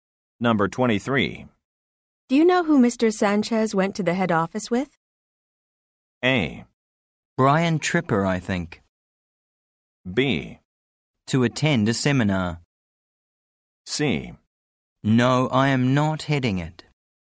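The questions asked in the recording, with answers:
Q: Do you know who Mr. Sanchez went to the head office with?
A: A: Brian Tripper, I think.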